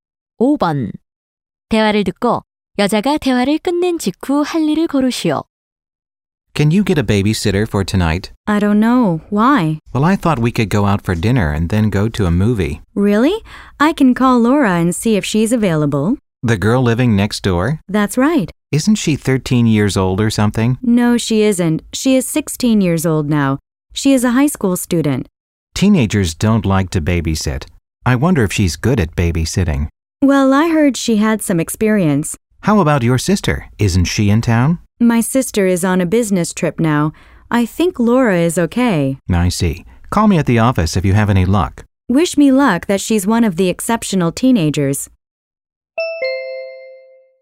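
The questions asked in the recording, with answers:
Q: 대화를 듣고 여자가 대화를 끝낸 직후 할 일을 고르시오.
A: Laura에게 전화해 아이 돌보기를 부탁한다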